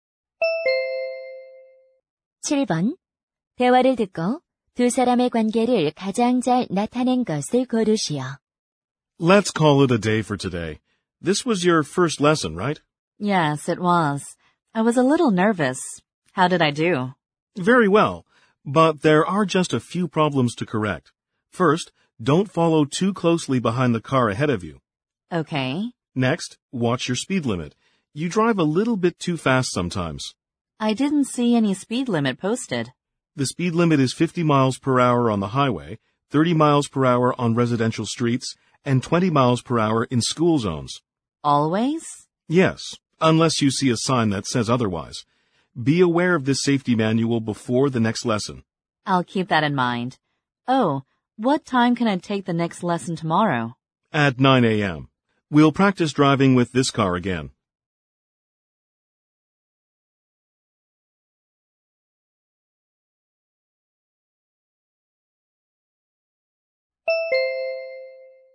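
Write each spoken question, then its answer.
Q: 대화를 듣고 두 사람의 관계를 가장 잘 나타낸 것을 고르시오.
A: 운전 강사와 수강생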